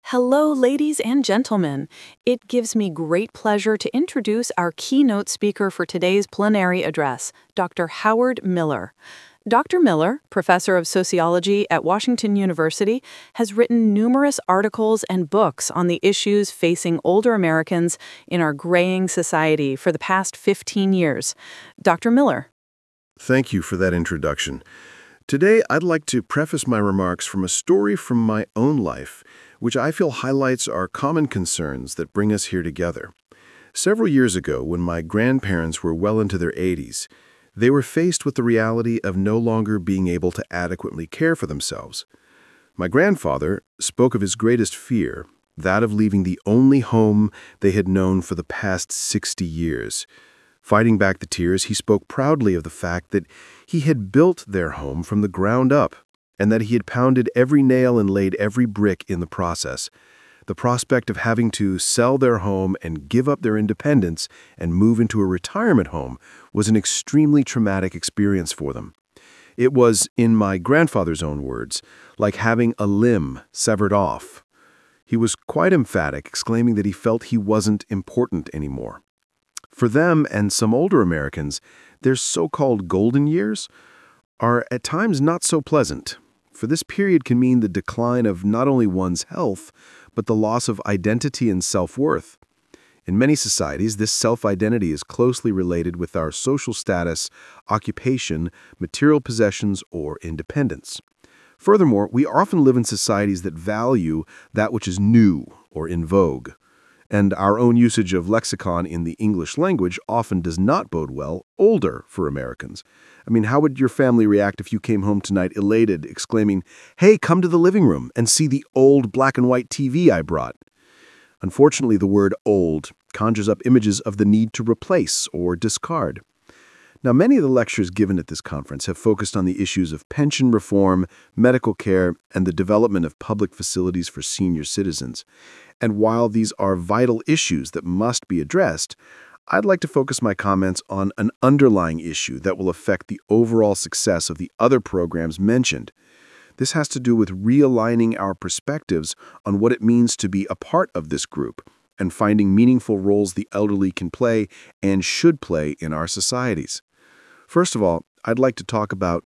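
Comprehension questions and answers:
What is the main topic of this address?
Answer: the need to reevaluate our attitudes towards senior citizens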